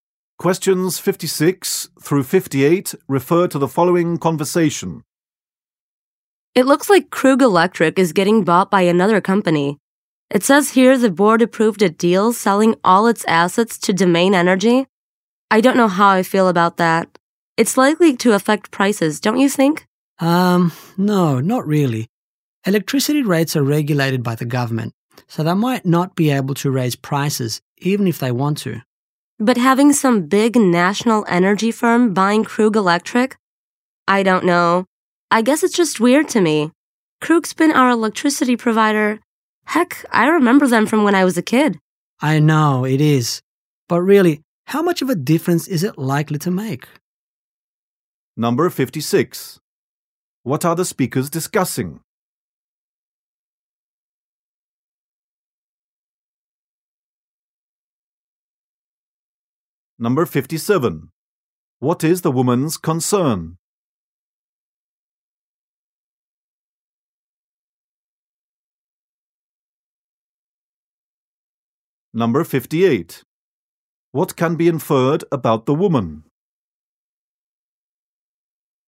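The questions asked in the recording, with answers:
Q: What are the speakers discussing?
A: Krug Electric being bought by Domain Energy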